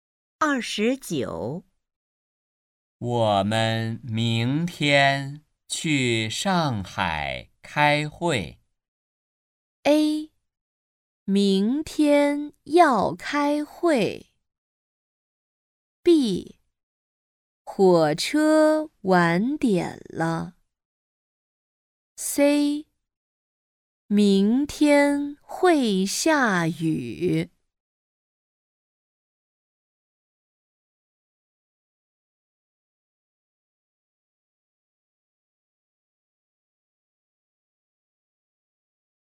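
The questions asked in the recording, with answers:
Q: 我们明天去上海开会。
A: A: 明天要开会。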